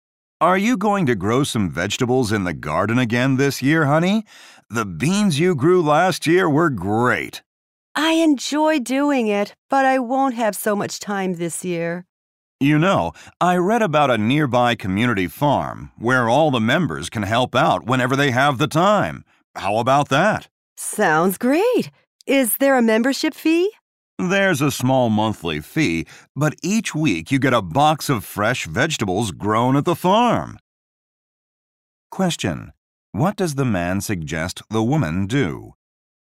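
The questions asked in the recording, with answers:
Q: What does the man suggest the woman do?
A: Join a nearby community farm.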